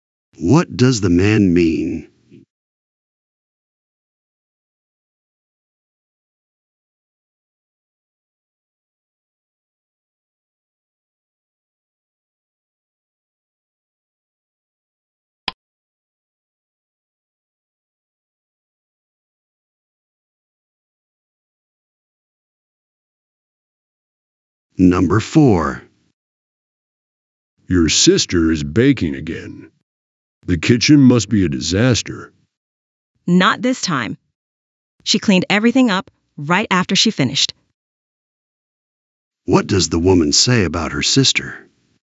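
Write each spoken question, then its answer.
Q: What does the woman say about her sister?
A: She cleaned up the kitchen right after baking.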